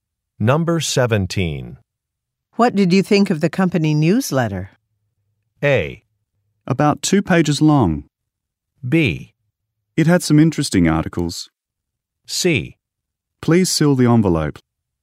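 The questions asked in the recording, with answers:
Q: What did you think of the company newsletter?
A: B: It had some interesting articles.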